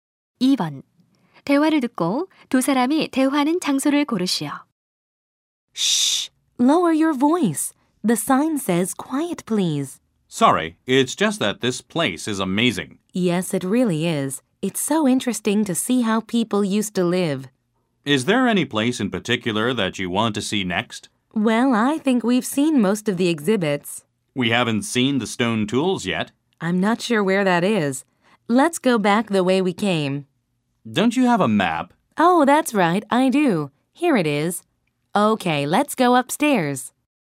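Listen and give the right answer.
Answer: 박물관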